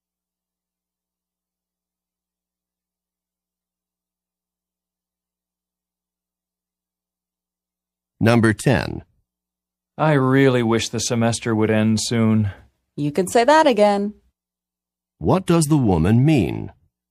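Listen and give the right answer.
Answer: She agrees; she also wants the semester to end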